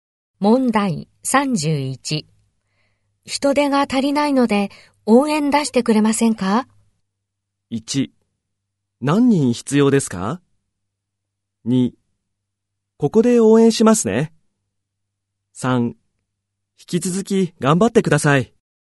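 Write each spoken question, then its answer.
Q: 人手が足りないので、応援出してくれませんか?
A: 1: 何人必要ですか?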